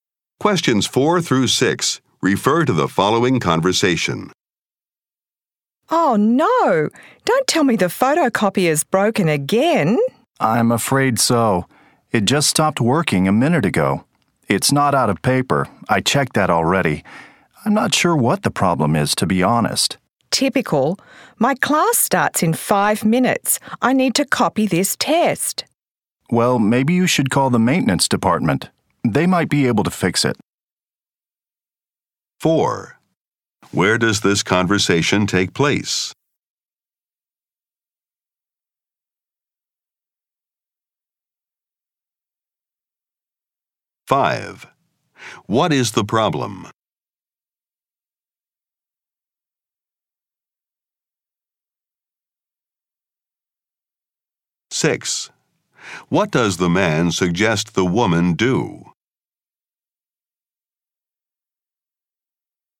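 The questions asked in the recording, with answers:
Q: What is the problem?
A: The photocopier is broken

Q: What does the man suggest the woman do?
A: Call the maintenance department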